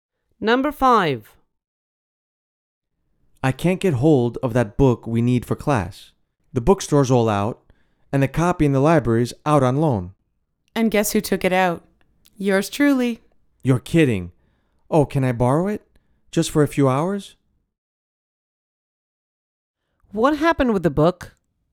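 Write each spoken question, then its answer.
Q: What happened with the book?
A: The man himself borrowed it from the library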